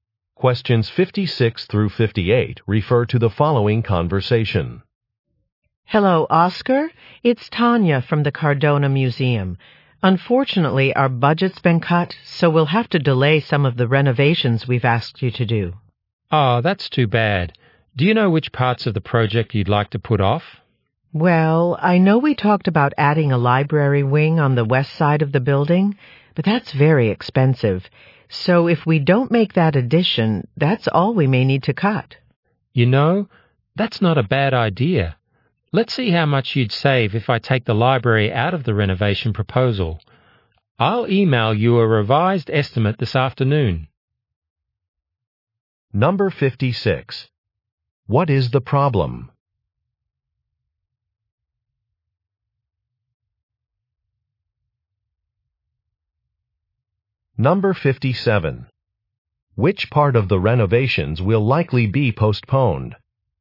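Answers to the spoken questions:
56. The museum's budget has been cut
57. The library wing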